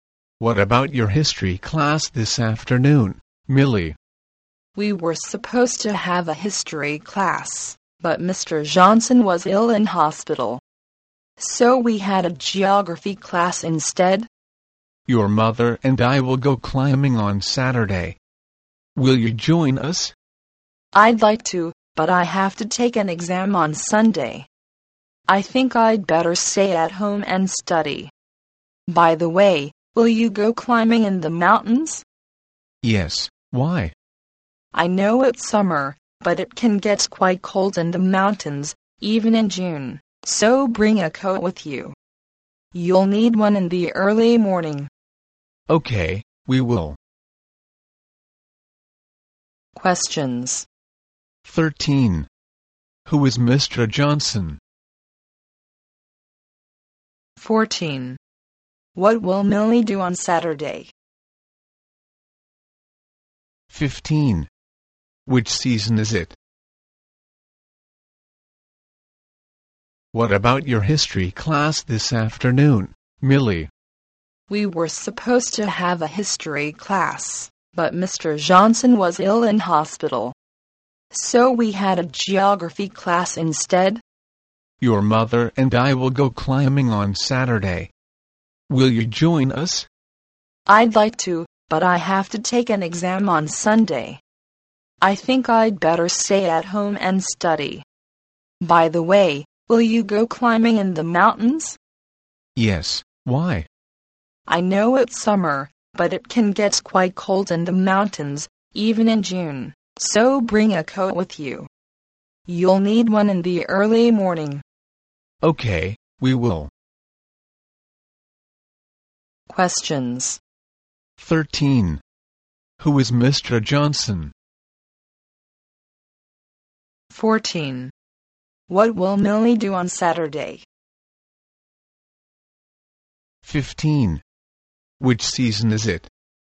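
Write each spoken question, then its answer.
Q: Who is Mr. Johnson?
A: Millie's history teacher

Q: What will Millie do on Saturday?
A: Stay at home and study

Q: Which season is it?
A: Summer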